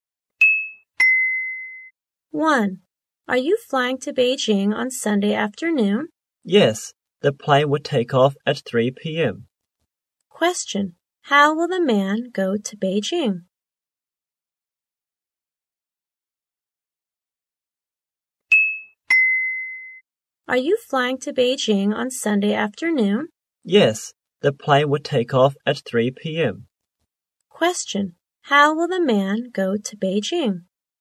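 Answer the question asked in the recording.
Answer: By plane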